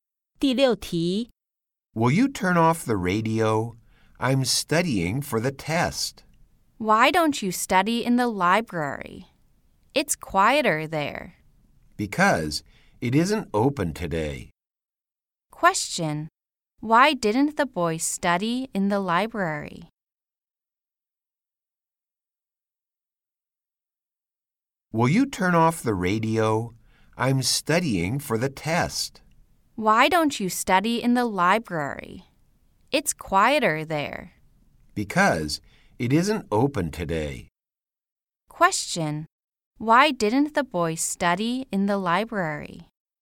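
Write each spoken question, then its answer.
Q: Why didn't the boy study in the library?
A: Because it isn't open today.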